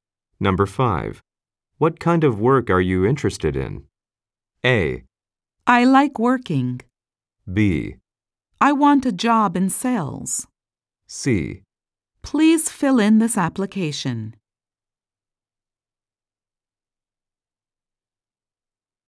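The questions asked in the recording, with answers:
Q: What kind of work are you interested in?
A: B: I want a job in sales.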